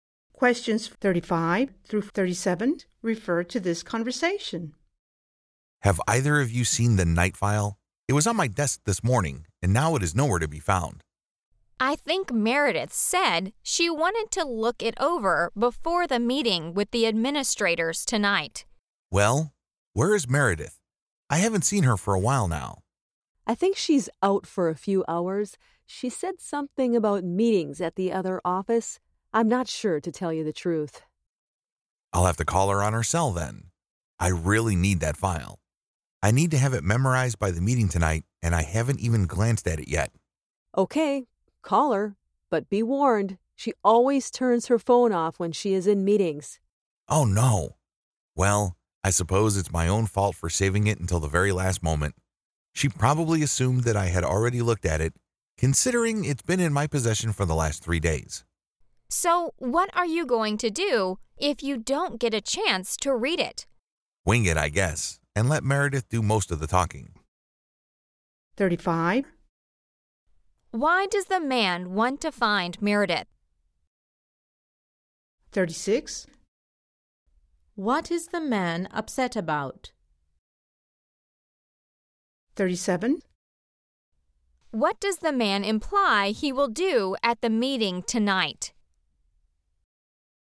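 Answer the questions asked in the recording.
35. She has the file he needs
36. He can't find the file and hasn't read it
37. Wing it and let Meredith do most of the talking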